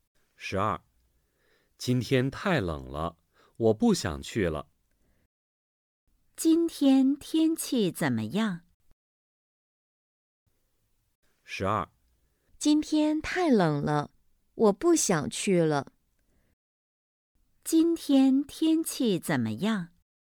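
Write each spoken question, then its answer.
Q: 今天天气怎么样?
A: 太冷了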